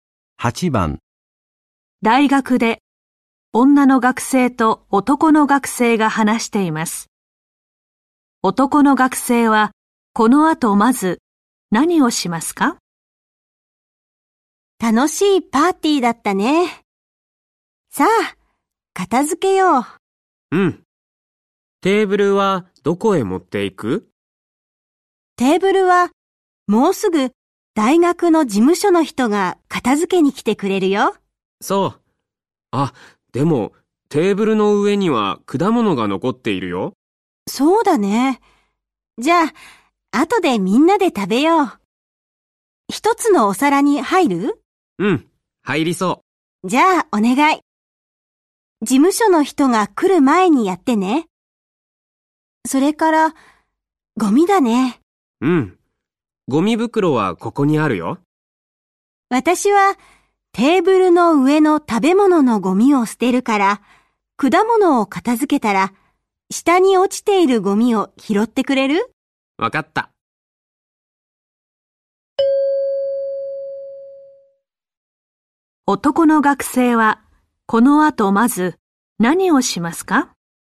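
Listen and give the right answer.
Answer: 果物を一つのお皿に入れる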